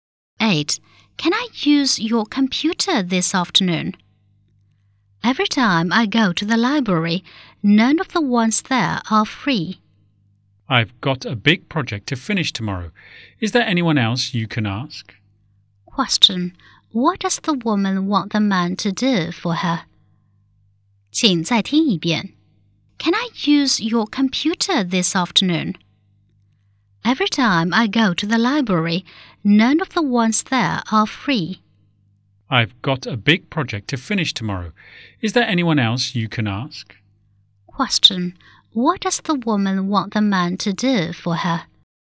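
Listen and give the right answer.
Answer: Let her use his computer this afternoon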